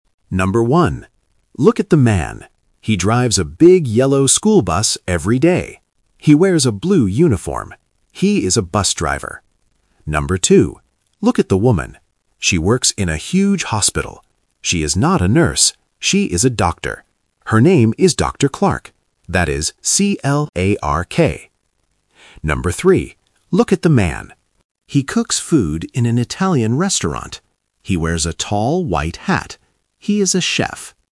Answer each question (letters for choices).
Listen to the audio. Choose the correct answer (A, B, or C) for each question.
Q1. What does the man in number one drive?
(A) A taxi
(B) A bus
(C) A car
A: B

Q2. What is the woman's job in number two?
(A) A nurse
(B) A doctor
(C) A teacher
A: B

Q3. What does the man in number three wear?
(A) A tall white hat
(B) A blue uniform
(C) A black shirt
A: A

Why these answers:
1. The narrator clearly says: "He drives a big yellow school bus." Options (A) and (C) are other vehicles but they are not mentioned in the audio.
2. The narrator states: "She is a doctor." Option (A) is the trap because the word "nurse" is mentioned, but the narrator says "She is not a nurse." Option (C) is not mentioned.
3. For person number three (the chef), the narrator says: "He wears a tall white hat." Option (B) is a trap because "a blue uniform" is mentioned, but it belongs to the bus driver in number one. Option (C) is not mentioned in the audio.

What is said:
Look at the man. He drives a big yellow school bus every day. He wears a blue uniform. He is a bus driver. She works in a huge hospital. She is not a nurse. She is a doctor. Her name is Dr. Clark. That is C-L-A-R-K. He cooks food in an Italian restaurant. He wears a tall white hat.

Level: A1